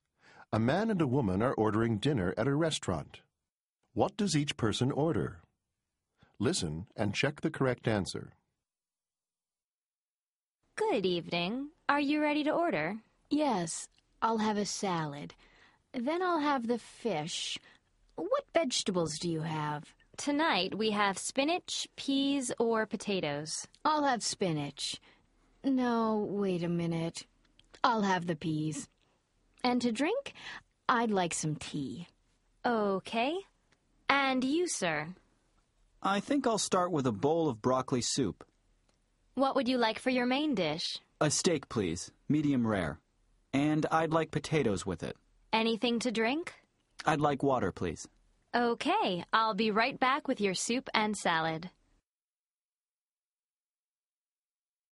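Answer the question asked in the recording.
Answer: Woman: salad, fish, peas, tea; man: broccoli soup, medium-rare steak, potatoes, water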